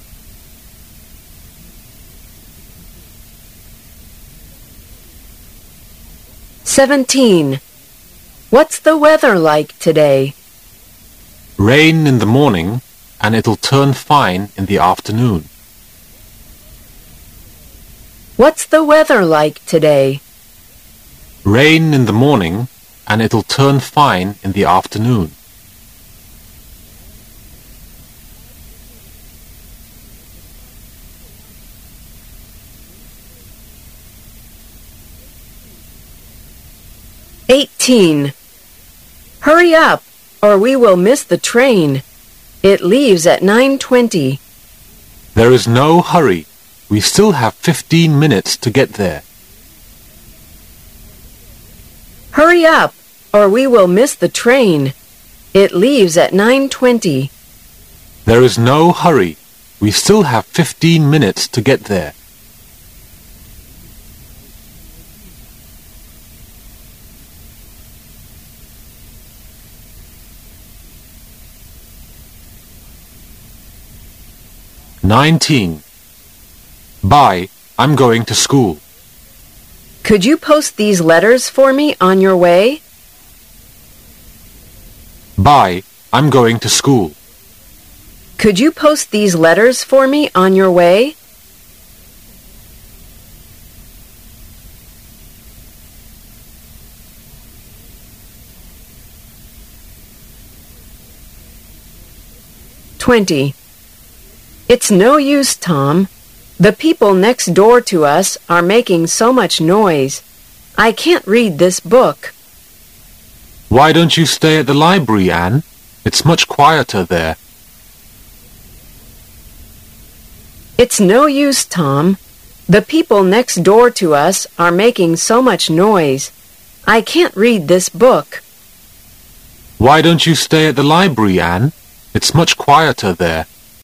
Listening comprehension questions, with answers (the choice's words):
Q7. What will the weather be like in the afternoon?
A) Rainy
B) Cloudy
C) Sunny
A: Sunny

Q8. What time is it now?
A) 9:00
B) 9:15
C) 9:05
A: 9:05

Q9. What did the woman ask the man to do ?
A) She asked him the way.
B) She asked him to post a few letters.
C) She asked him to get some stamps for her.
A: She asked him to post a few letters.

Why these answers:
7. W: What's the weather like today? M: Rain in the morning, and it'll turn fine in the afternoon.
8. W: Hurry up, or we will miss the train. If leaver at 9:20. M: There is no hurry. We still have 15 minutes to get there.
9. M: Bye! I'm going to school. W: Could you post these letters for me on your way?